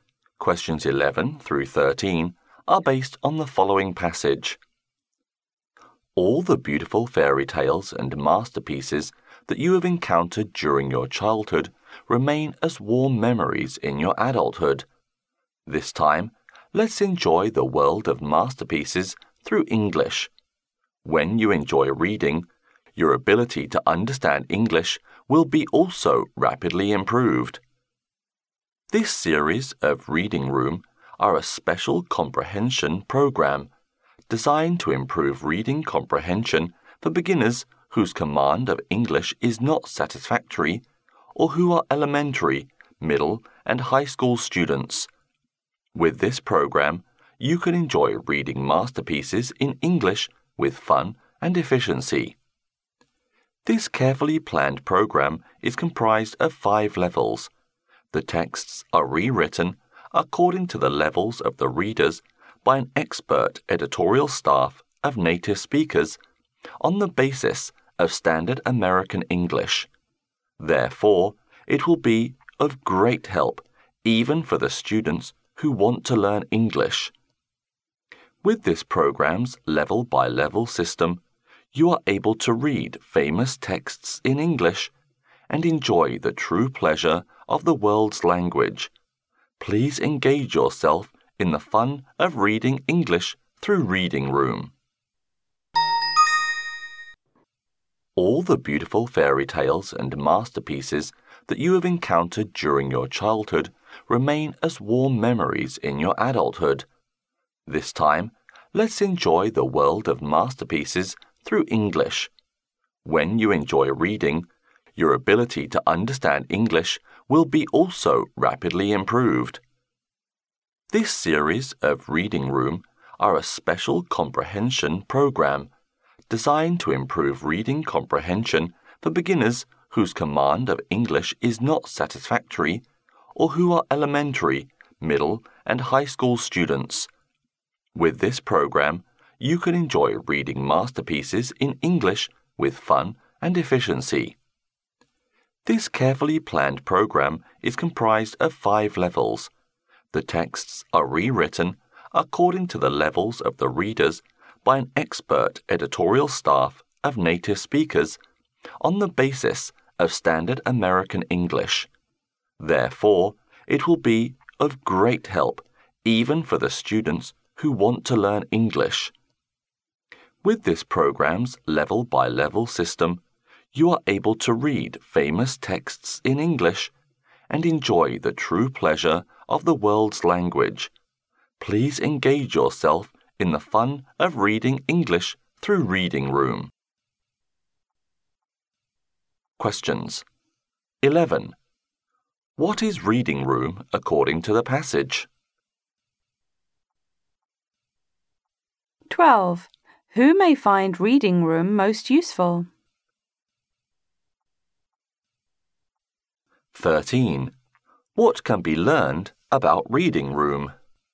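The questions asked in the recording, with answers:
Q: What is Reading Room according to the passage?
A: A reading comprehension program for learning English

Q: Who may find Reading Room most useful?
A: Beginners whose English is not good, such as school students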